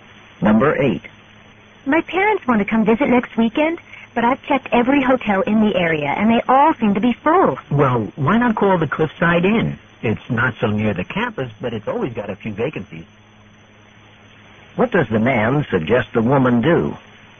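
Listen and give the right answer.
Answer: Call the Cliffside Inn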